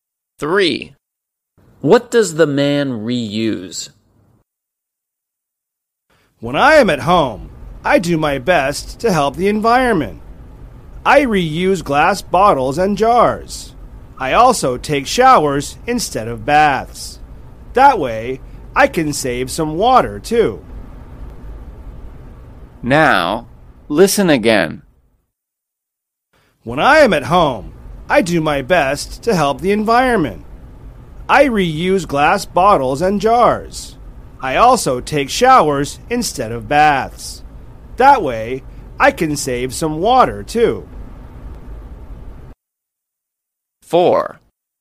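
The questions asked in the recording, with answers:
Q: What does the man reuse?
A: Glass bottles and jars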